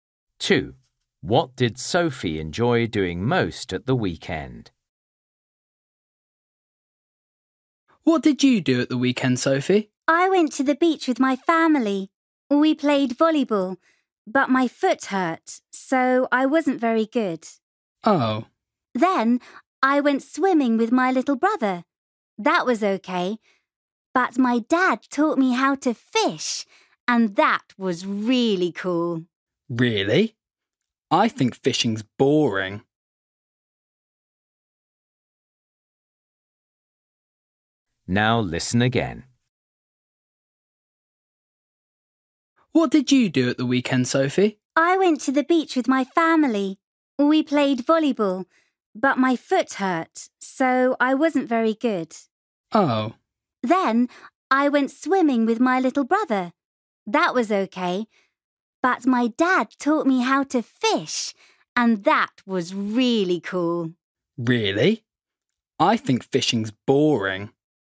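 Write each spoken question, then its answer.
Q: What did Sophie enjoy doing most at the weekend?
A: fishing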